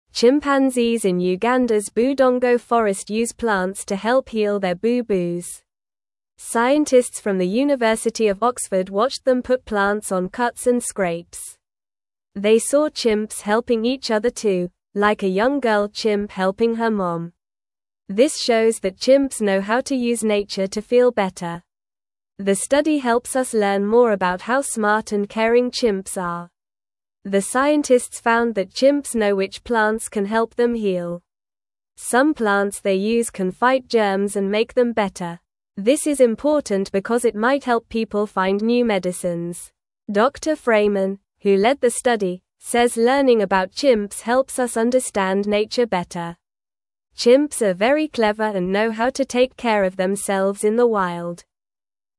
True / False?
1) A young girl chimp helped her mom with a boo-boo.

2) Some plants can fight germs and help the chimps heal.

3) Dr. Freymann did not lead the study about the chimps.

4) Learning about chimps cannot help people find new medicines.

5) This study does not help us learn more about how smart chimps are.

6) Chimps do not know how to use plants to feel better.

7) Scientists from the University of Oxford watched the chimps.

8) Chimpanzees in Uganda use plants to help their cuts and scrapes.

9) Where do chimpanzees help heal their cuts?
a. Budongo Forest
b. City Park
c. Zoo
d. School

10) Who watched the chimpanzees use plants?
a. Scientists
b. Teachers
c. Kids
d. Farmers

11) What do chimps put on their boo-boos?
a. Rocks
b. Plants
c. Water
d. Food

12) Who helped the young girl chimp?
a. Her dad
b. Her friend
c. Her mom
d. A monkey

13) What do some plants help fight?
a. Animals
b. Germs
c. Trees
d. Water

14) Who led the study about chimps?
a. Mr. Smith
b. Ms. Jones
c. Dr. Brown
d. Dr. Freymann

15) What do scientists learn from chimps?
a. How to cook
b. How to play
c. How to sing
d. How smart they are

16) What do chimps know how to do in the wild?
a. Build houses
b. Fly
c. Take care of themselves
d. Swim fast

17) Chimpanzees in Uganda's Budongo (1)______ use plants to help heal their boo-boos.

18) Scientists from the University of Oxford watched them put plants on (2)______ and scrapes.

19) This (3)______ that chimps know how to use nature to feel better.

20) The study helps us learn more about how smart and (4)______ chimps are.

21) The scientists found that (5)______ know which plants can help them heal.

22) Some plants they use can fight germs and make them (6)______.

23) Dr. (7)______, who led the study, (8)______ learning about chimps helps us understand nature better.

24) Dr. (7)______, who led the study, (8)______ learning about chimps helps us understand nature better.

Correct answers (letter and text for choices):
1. True
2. True
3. False
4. False
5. False
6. False
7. True
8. True
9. a. Budongo Forest
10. a. Scientists
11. b. Plants
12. c. Her mom
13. b. Germs
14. d. Dr. Freymann
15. d. How smart they are
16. c. Take care of themselves
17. Forest
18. cuts
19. shows
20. caring
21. chimps
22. better
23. Freymann
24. says

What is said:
Chimpanzees in Uganda's Budongo Forest use plants to help heal their boo-boos. Scientists from the University of Oxford watched them put plants on cuts and scrapes. They saw chimps helping each other too, like a young girl chimp helping her mom. This shows that chimps know how to use nature to feel better. The study helps us learn more about how smart and caring chimps are.
The scientists found that chimps know which plants can help them heal. Some plants they use can fight germs and make them better. This is important because it might help people find new medicines. Dr. Freymann, who led the study, says learning about chimps helps us understand nature better. Chimps are very clever and know how to take care of themselves in the wild.

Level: Level 1